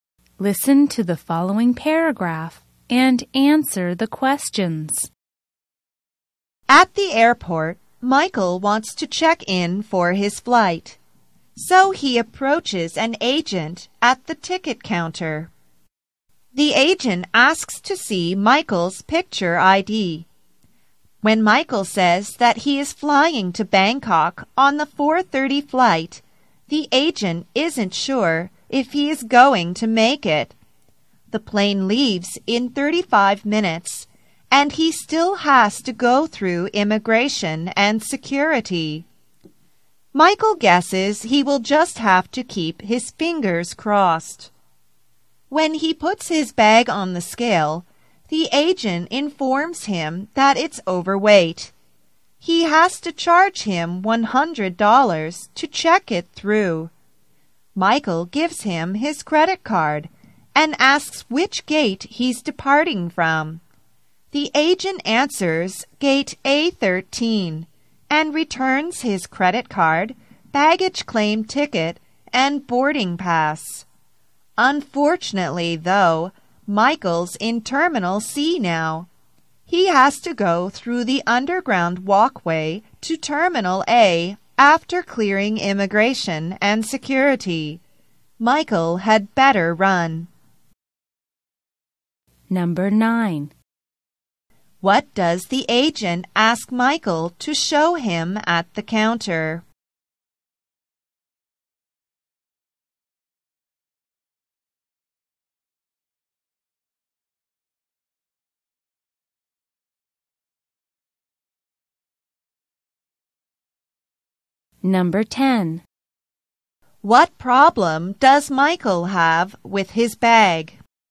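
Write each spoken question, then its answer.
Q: What does the agent ask Michael to show him at the counter?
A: His picture ID.

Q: What problem does Michael have with his bag?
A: It's overweight.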